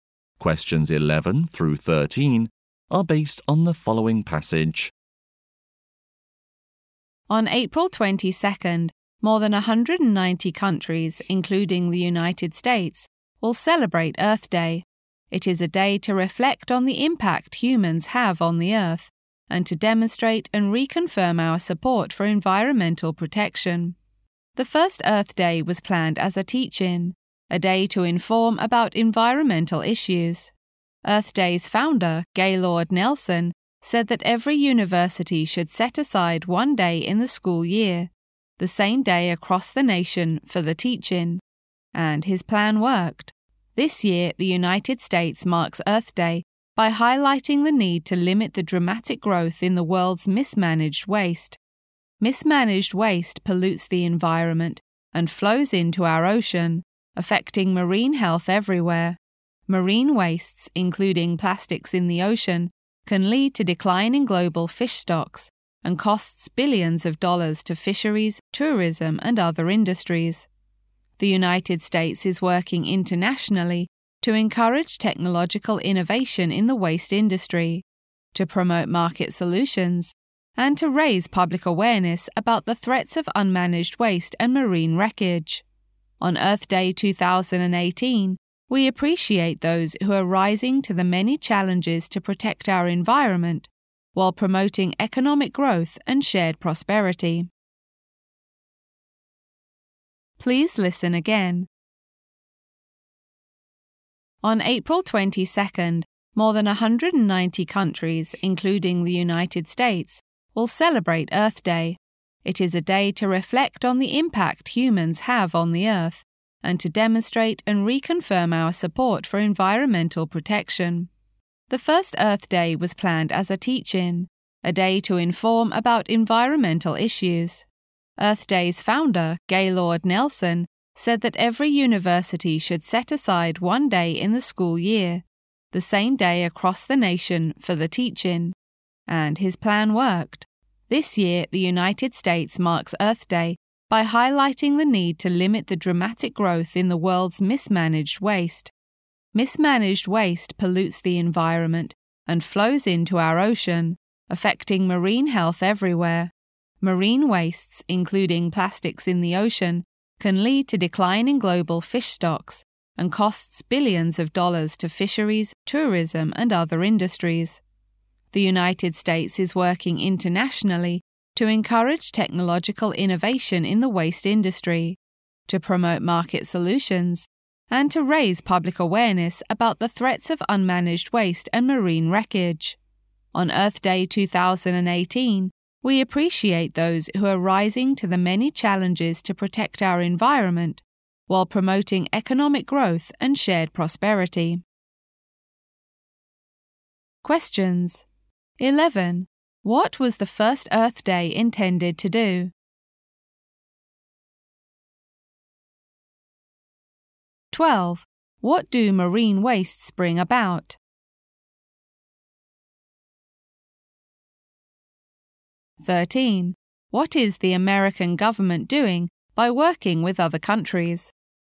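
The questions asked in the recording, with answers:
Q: What was the first Earth Day intended to do?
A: Inform people about environmental issues

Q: What do marine wastes bring about?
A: Declining global fish stocks and huge economic costs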